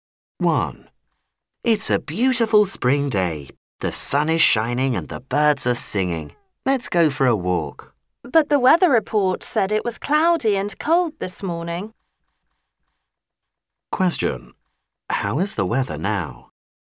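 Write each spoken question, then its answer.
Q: How is the weather now?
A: Sunny and warm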